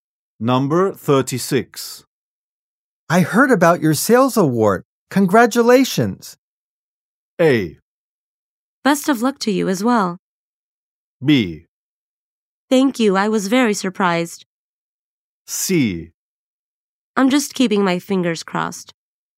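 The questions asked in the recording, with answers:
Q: I heard about your sales award.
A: B: Thank you. I was very surprised.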